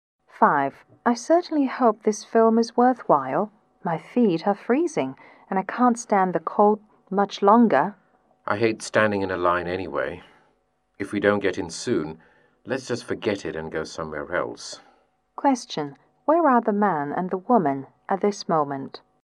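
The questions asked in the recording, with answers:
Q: Where are the man and the woman at this moment?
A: Standing in line outside a cinema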